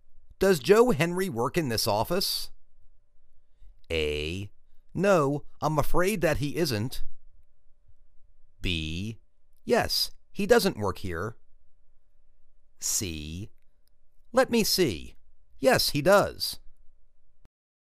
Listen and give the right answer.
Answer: Let me see. Yes, he does.